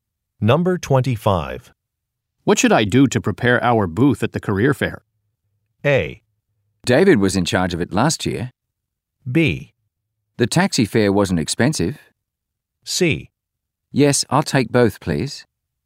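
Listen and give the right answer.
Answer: A: David was in charge of it last year.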